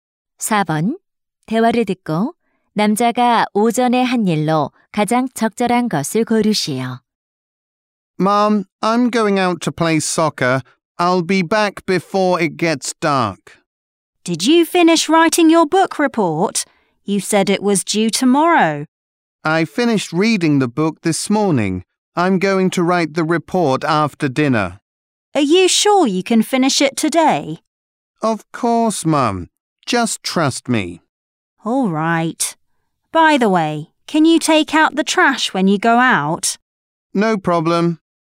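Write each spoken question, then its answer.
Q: 대화를 듣고 남자가 오전에 한 일로 가장 적절한 것을 고르시오.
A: 책 읽기를 끝냄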